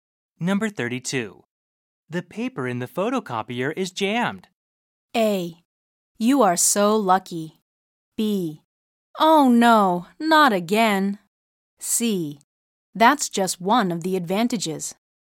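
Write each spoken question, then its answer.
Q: The paper in the photocopier is jammed.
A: B: Oh no, not again.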